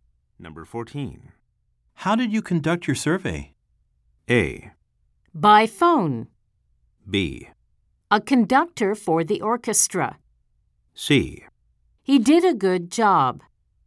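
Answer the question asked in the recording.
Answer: A: By phone.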